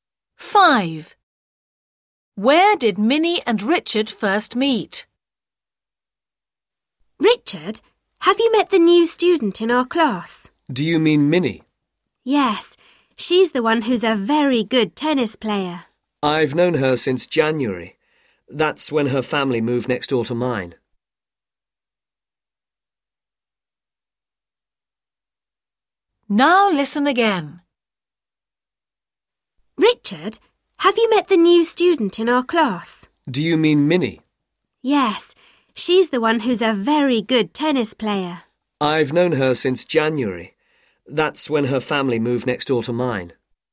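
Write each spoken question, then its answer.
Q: Where did Minnie and Richard first meet?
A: at home; her family moved in next door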